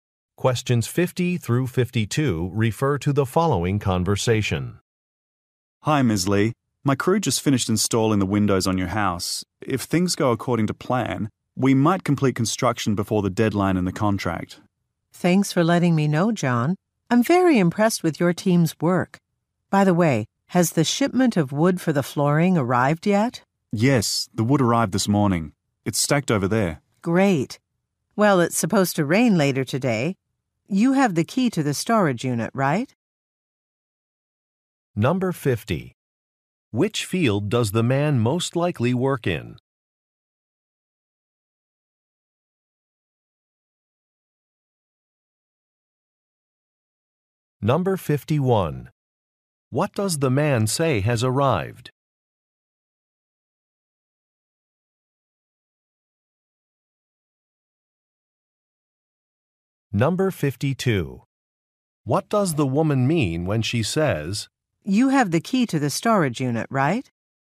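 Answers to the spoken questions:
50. Construction
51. The wood for the flooring
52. She wants the wood moved into storage before it rains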